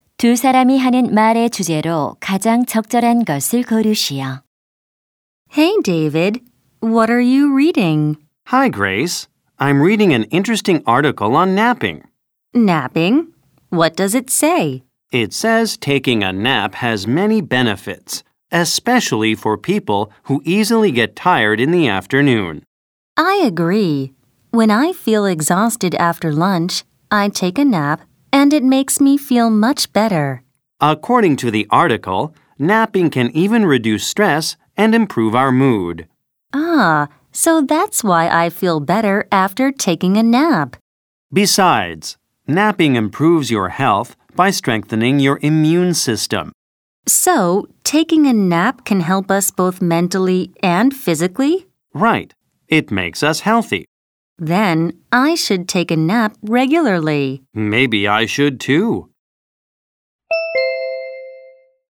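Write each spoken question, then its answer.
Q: 두 사람이 하는 말의 주제로 가장 적절한 것을 고르시오.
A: 낮잠의 이점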